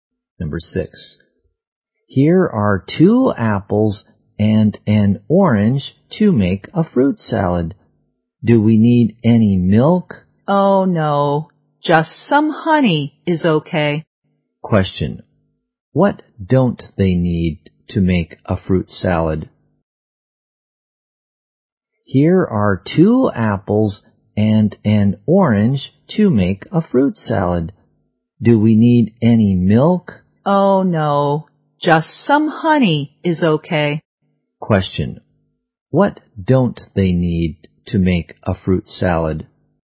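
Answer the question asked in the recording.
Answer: Milk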